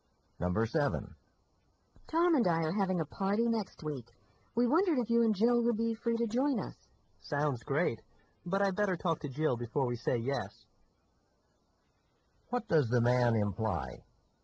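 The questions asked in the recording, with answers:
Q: What does the man imply?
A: He must check with Jill before accepting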